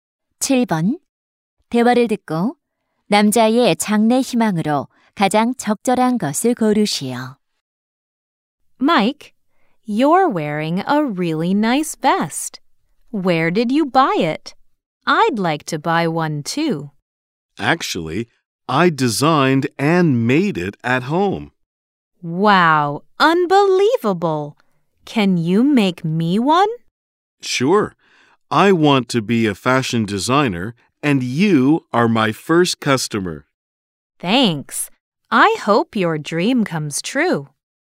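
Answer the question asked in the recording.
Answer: 패션 디자이너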